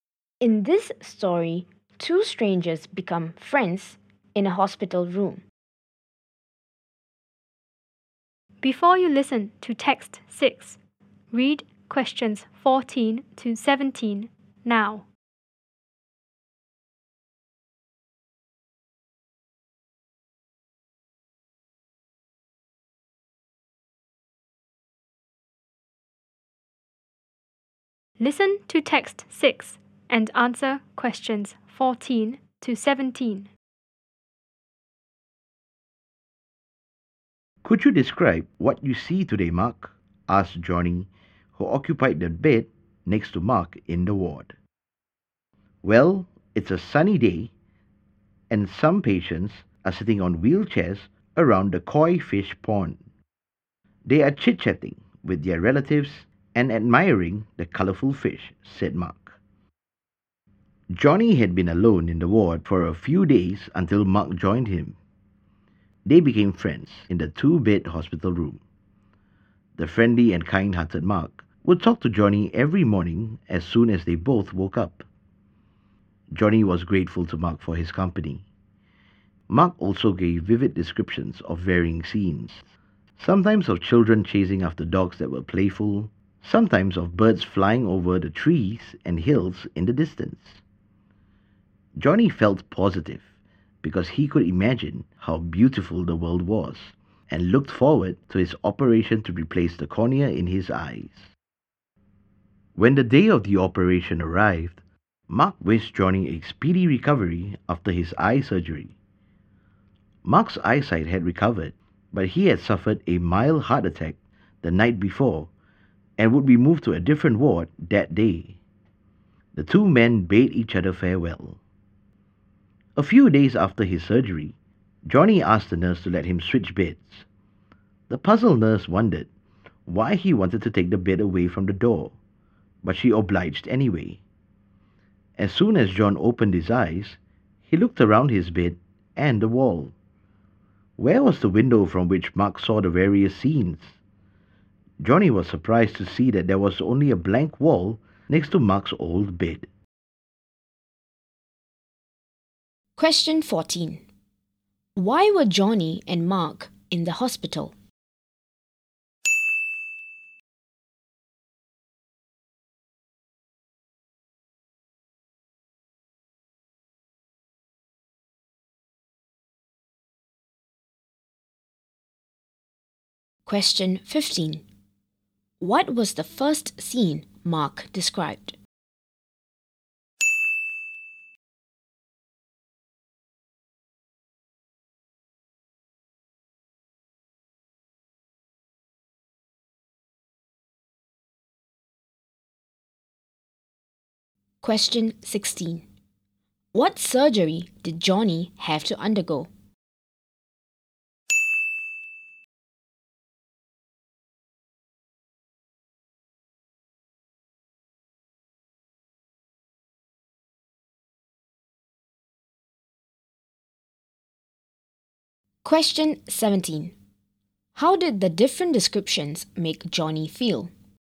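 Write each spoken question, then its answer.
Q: What was the first scene Mark described?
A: Patients in wheelchairs around the koi fish pond, chatting with relatives and admiring the fish

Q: What surgery did Johnny have to undergo?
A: Eye surgery to replace the cornea

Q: How did the different descriptions make Johnny feel?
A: Positive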